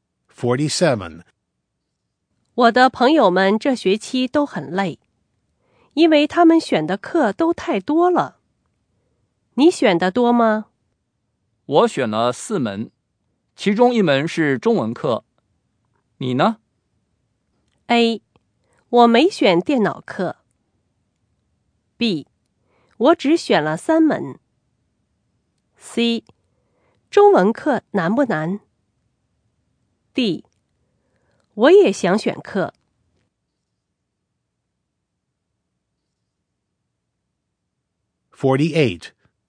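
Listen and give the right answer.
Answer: B: 我只选了3门。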